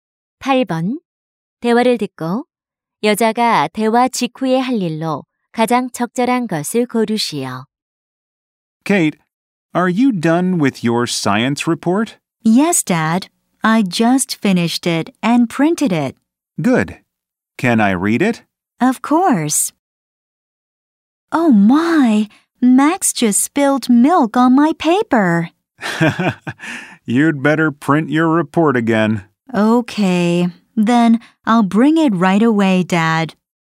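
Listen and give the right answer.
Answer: 보고서 다시 인쇄하기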